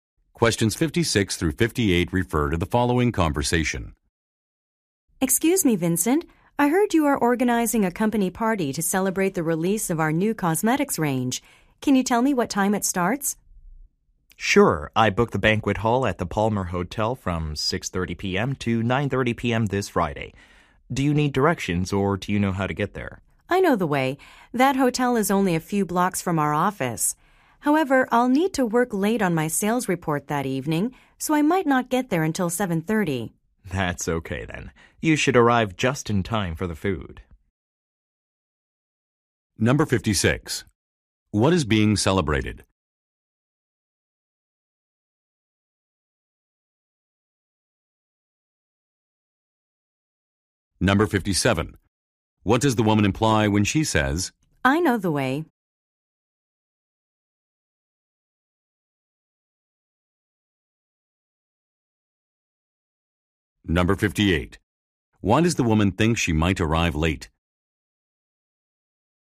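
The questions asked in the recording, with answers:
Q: What is being celebrated?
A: The release of a new cosmetics range

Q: What does the woman imply when she says,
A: She does not need directions

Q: Why does the woman think she might arrive late?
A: She must work late on her sales report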